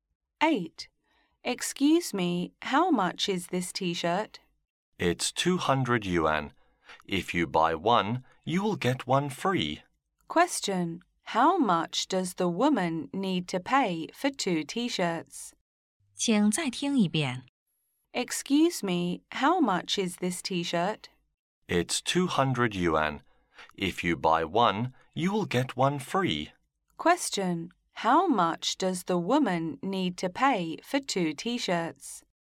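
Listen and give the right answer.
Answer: 200 yuan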